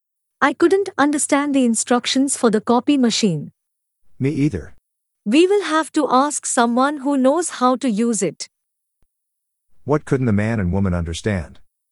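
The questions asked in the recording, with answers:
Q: What couldn't the man and woman understand?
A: The instructions for the copy machine.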